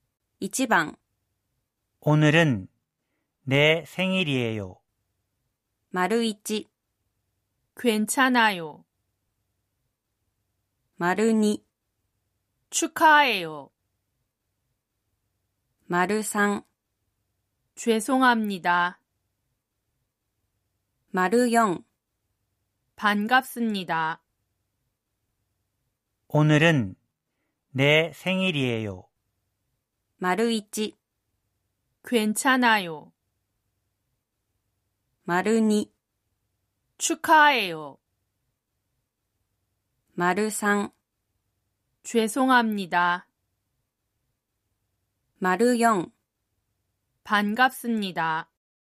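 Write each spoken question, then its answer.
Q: 오늘은내생일이에요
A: 2: 축하해요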